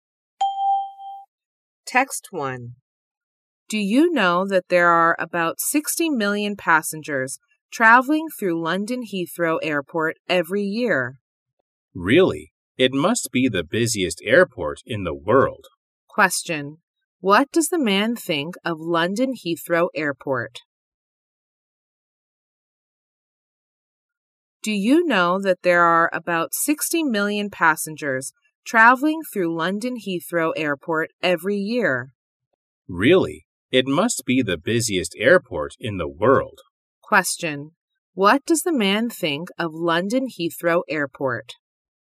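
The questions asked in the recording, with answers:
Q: What does the man think of London Heathrow Airport?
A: It must be the busiest airport in the world.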